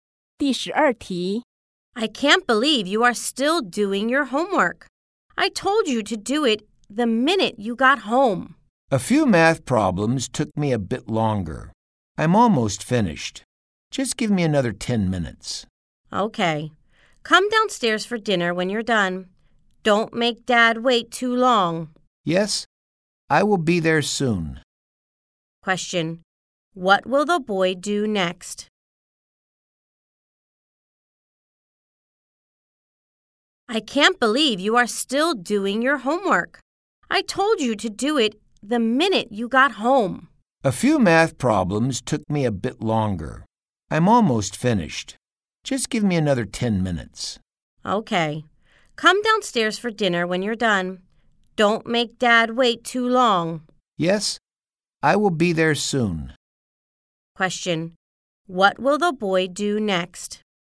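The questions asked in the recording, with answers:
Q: What will the boy do next?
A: Finish his homework, then go downstairs for dinner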